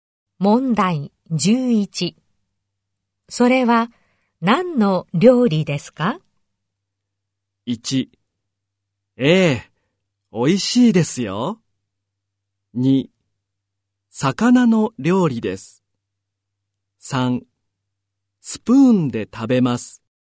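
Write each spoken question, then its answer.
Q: それは何の料理ですか?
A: 2: 魚の料理です。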